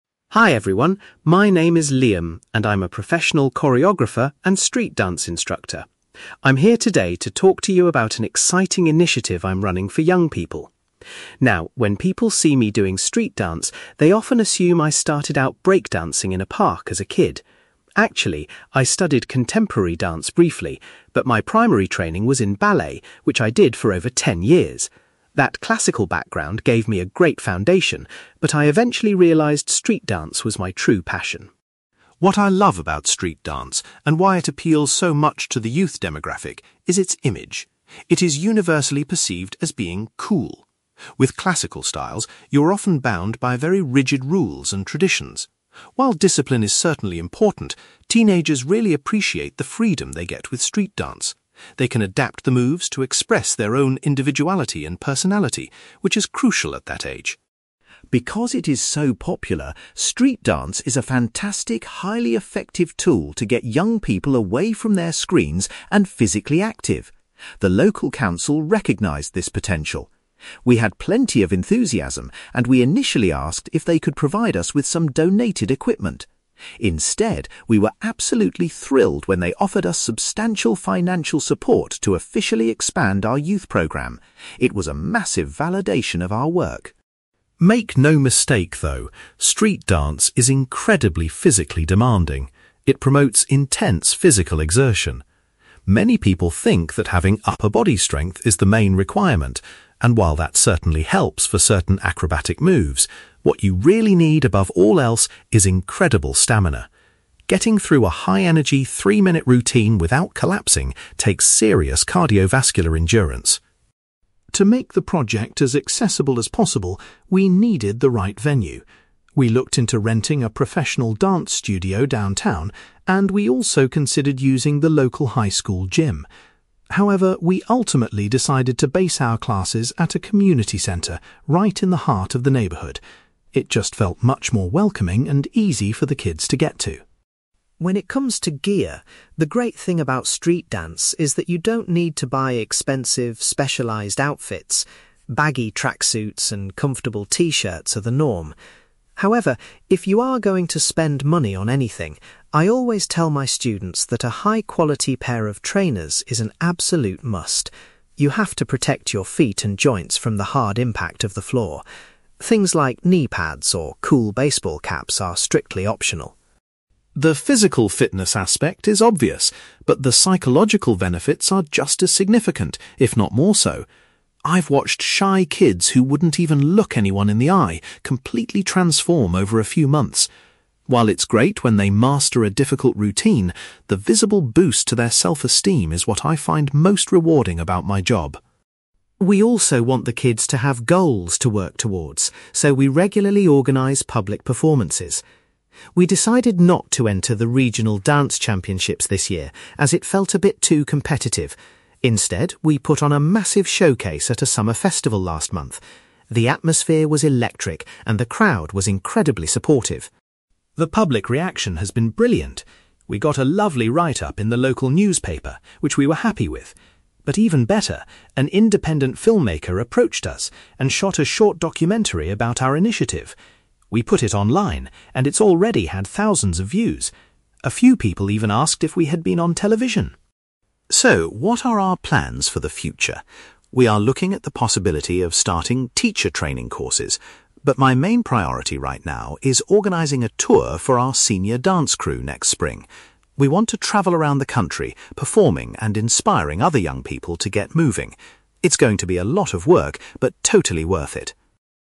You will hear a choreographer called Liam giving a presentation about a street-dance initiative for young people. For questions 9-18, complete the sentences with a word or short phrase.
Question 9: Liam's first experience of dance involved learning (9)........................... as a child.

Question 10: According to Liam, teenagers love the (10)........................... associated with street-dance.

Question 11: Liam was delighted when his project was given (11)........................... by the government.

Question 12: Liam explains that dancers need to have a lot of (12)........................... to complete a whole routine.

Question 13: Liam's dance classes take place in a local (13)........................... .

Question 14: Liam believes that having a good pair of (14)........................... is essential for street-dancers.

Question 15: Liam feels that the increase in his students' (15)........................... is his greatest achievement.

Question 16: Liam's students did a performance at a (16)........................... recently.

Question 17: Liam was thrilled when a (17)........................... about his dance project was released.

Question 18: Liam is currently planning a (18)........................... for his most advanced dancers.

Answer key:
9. ballet
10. freedom
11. financial support
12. stamina
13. community centre
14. trainers
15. self-esteem
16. summer festival
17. documentary
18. tour

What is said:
Liam: Hi everyone, my name is Liam, and I'm a professional choreographer and street-dance instructor. I'm here today to talk to you about an exciting initiative I'm running for young people. Now, when people see me doing street-dance, they often assume I started out breakdancing in a park as a kid. Actually, I studied contemporary dance briefly, but my primary training was in ballet, which I did for over ten years. That classical background gave me a great foundation, but I eventually realised street-dance was my true passion.
What I love about street-dance, and why it appeals so much to the youth demographic, is its image. It is universally perceived as being 'cool'. With classical styles, you are often bound by very rigid rules and traditions. While discipline is certainly important, teenagers really appreciate the freedom they get with street-dance. They can adapt the moves to express their own individuality and personality, which is crucial at that age.
Because it is so popular, street-dance is a fantastic, highly effective tool to get young people away from their screens and physically active. The local council recognised this potential. We had plenty of enthusiasm, and we initially asked if they could provide us with some donated equipment. Instead, we were absolutely thrilled when they offered us substantial financial support to officially expand our youth programme. It was a massive validation of our work.
Make no mistake, though—street-dance is incredibly physically demanding. It promotes intense physical exertion. Many people think that having upper body strength is the main requirement, and while that certainly helps for certain acrobatic moves, what you really need above all else is incredible stamina. Getting through a high-energy, three-minute routine without collapsing takes serious cardiovascular endurance!
To make the project as accessible as possible, we needed the right venue. We looked into renting a professional dance studio downtown, and we also considered using the local high school gym. However, we ultimately decided to base our classes at a community centre right in the heart of the neighbourhood. It just felt much more welcoming and easy for the kids to get to.
When it comes to gear, the great thing about street-dance is that you don't need to buy expensive, specialised outfits. Baggy tracksuits and comfortable t-shirts are the norm. However, if you are going to spend money on anything, I always tell my students that a high-quality pair of trainers is an absolute must. You have to protect your feet and joints from the hard impact of the floor. Things like knee pads or cool baseball caps are strictly optional.
The physical fitness aspect is obvious, but the psychological benefits are just as significant, if not more so. I've watched shy kids who wouldn't even look anyone in the eye completely transform over a few months. While it's great when they master a difficult routine, the visible boost to their self-esteem is what I find most rewarding about my job.
We also want the kids to have goals to work towards, so we regularly organise public performances. We decided not to enter the regional dance championships this year as it felt a bit too competitive. Instead, we put on a massive showcase at a summer festival last month. The atmosphere was electric, and the crowd was incredibly supportive.
The public reaction has been brilliant. We got a lovely write-up in the local newspaper, which we were happy with. But even better, an independent filmmaker approached us and shot a short documentary about our initiative! We put it online, and it's already had thousands of views. A few people even asked if we had been on television!
So, what are our plans for the future? We are looking at the possibility of starting teacher training courses. But my main priority right now is organising a tour for our senior dance crew next spring. We want to travel around the country, performing and inspiring other young people to get moving. It's going to be a lot of work, but totally worth it.

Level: B2